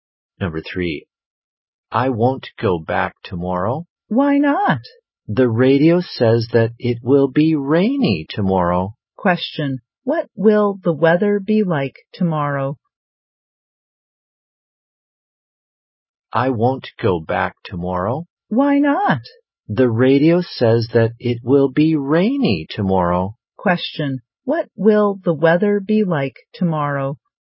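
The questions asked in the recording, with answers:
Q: what will the weather be like tomorrow?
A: Rainy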